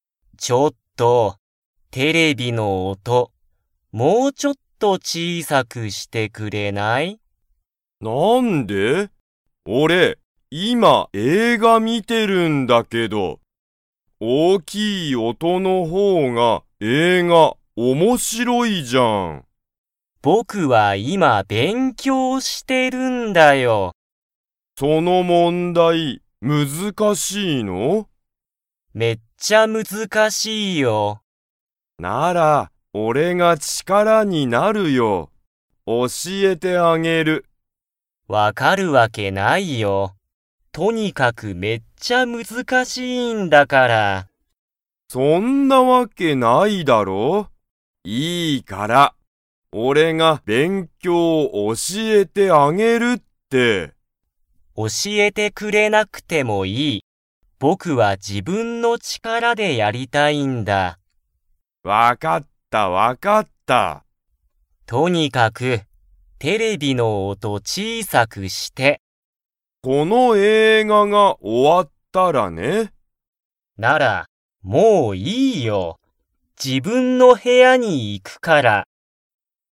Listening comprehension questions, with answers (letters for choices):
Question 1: 兄(あに)は今(いま)、____を観(み)ている。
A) 自然(しぜん)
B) スマホ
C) 写真(しゃしん)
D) 映画(えいが)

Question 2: 兄(あに)は今(いま)、テレビの音(おと)を小(ちい)さくしますか?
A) はい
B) いいえ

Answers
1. D
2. B

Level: Level 2